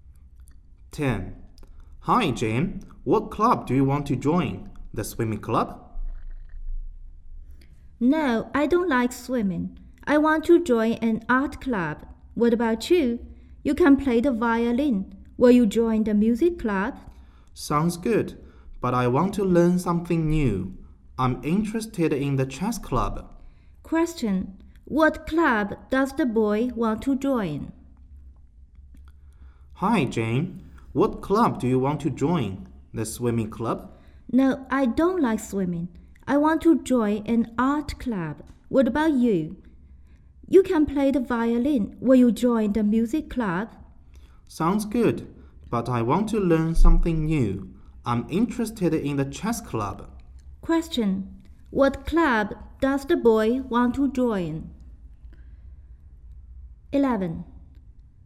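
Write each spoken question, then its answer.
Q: What club does the boy want to join?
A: The chess club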